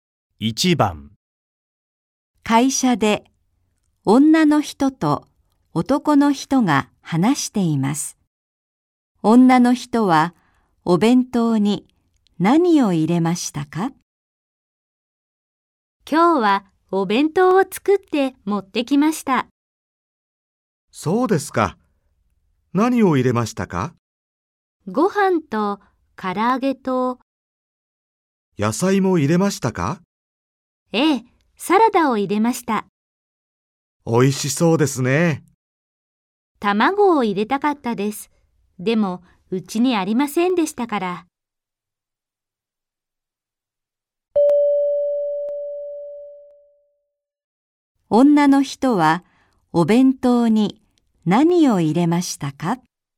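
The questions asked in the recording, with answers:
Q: 女の人はお弁当に何を入れましたか?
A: ご飯と唐揚げとサラダ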